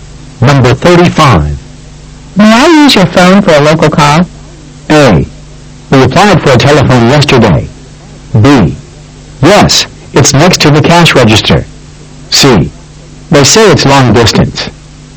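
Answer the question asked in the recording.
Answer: B: Yes, it's next to the cash register.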